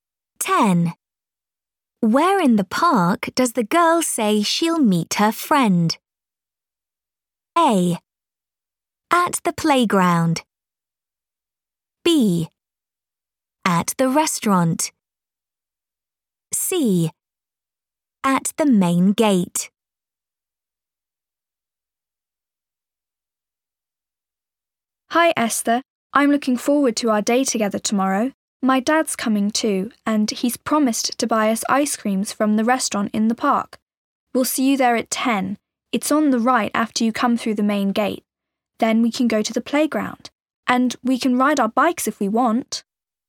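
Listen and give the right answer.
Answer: B: At the restaurant.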